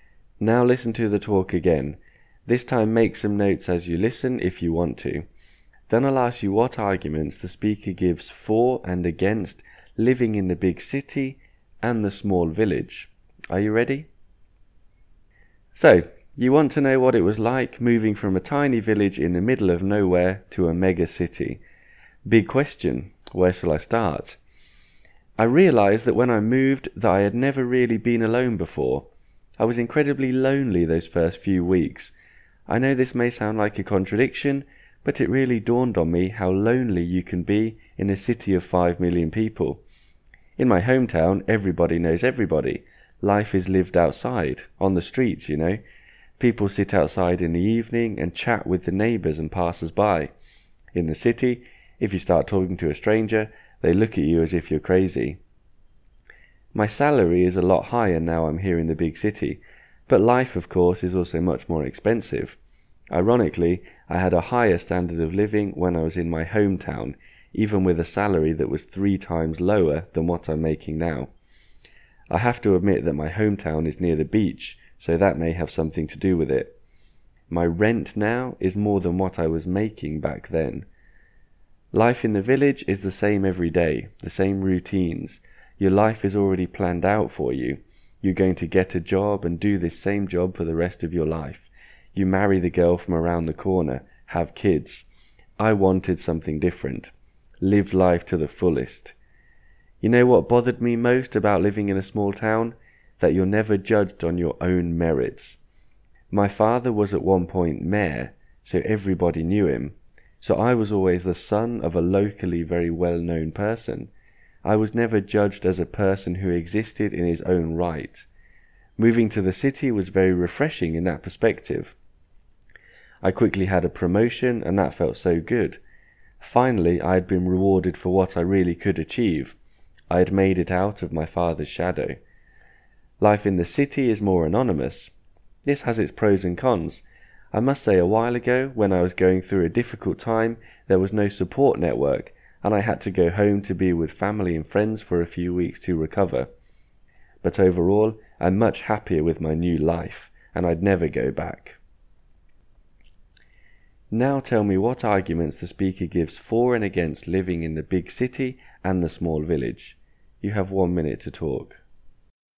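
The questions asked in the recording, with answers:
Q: Now tell me what arguments the speaker gives for and against living in the big city and the small village.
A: City: better pay and a promotion earned on his own merits, out of his father's shadow, and more freedom and variety. But it is lonely, strangers don't talk, life is more expensive, and there is no support network. Village: everyone knows each other, people chat outside, life is cheaper with a better standard of living, and it is near the beach. But every day is the same, your life is planned for you, and you are judged by your family.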